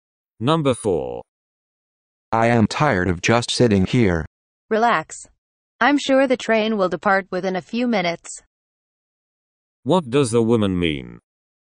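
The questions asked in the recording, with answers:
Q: What does the woman mean?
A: The train will leave in a few minutes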